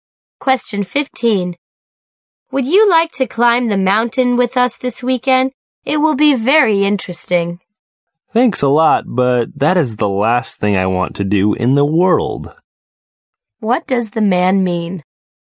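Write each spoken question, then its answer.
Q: What does the man mean?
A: He doesn't want to go climbing at all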